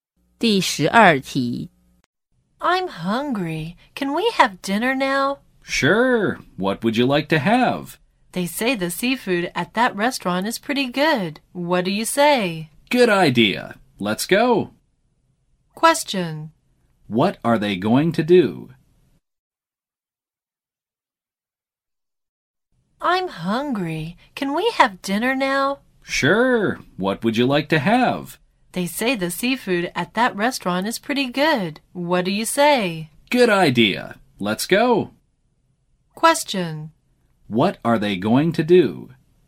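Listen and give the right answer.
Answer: Have seafood for dinner at a restaurant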